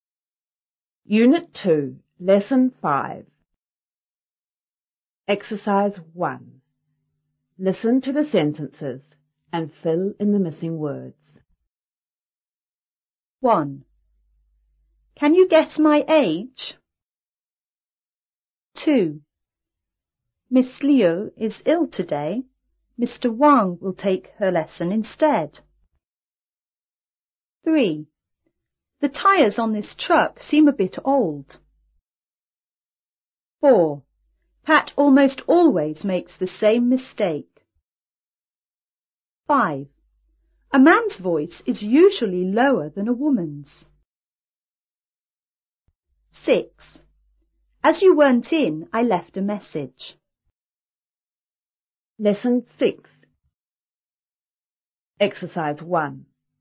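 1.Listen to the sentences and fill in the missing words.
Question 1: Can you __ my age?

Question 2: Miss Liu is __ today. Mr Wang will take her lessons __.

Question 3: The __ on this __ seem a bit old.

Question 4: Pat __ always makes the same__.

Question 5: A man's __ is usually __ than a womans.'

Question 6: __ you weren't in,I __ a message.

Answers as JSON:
{"1": "guess", "2": "ill; instead", "3": "tyres; truck", "4": "almost; mistake", "5": "voice; lower", "6": "As; left"}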